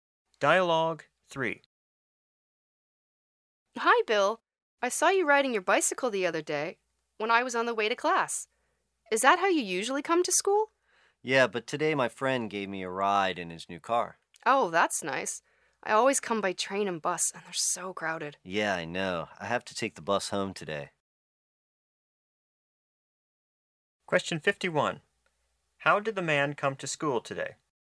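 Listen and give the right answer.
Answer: His friend drove him in his new car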